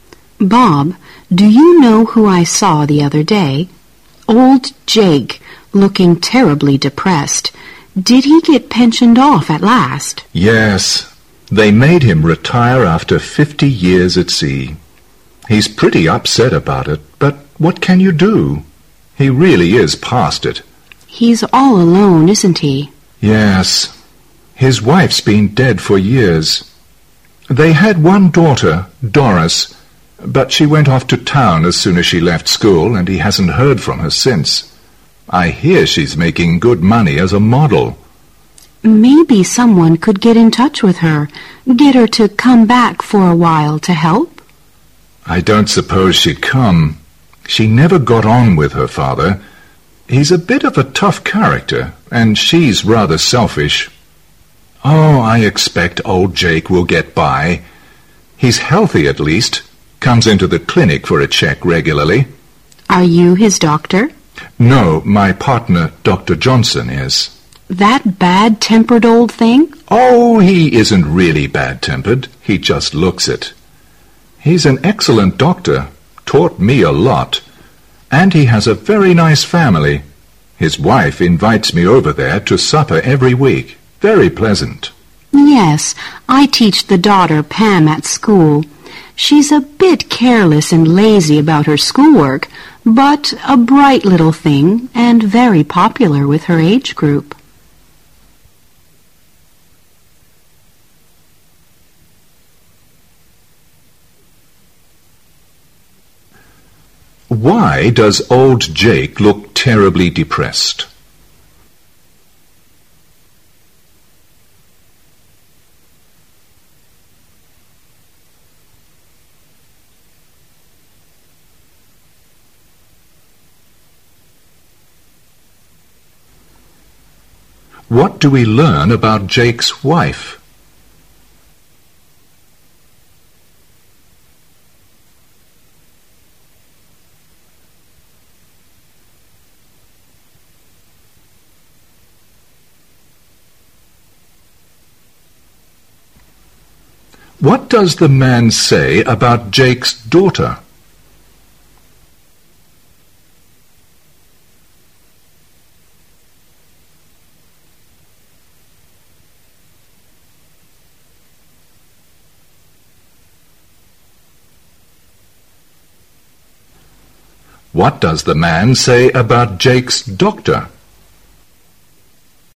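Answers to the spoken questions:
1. He was made to retire after 50 years at sea.
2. She has been dead for years.
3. She is selfish and never got on with her father.
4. He looks bad-tempered but is an excellent doctor.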